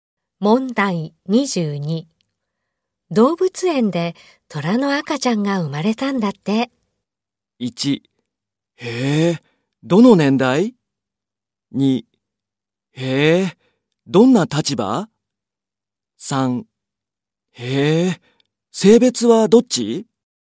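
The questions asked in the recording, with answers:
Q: 動物園で虎の赤ちゃんが生まれたんだって。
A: 3: 性別はどっち?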